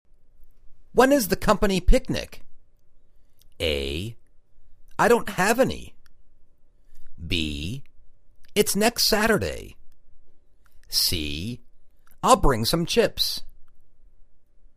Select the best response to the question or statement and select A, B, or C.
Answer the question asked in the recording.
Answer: It's next Saturday.